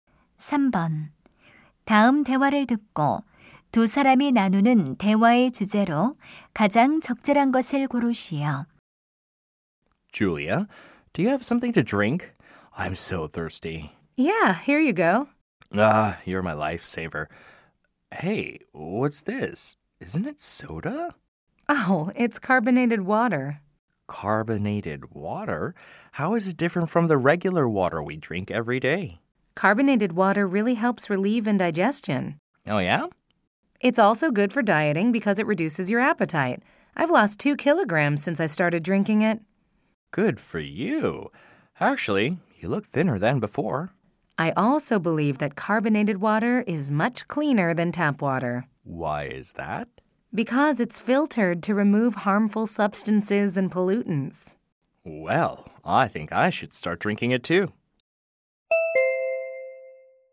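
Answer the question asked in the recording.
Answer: 탄산수의 장점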